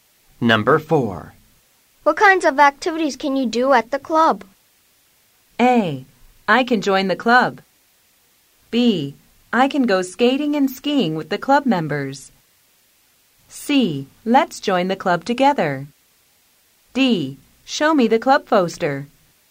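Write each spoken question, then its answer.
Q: What kinds of activities can you do at the club?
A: B: I can go skating and skiing with the club members.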